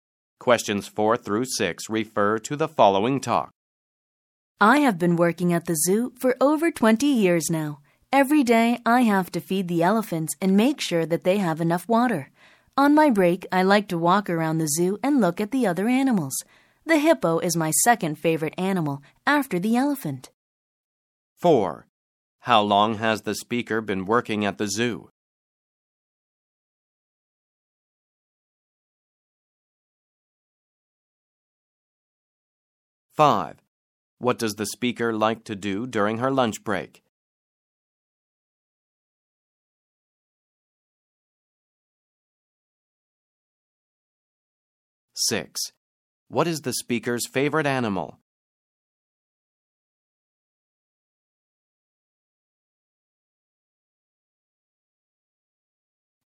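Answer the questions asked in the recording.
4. Over 20 years
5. Walk around the zoo and look at the other animals
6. The elephant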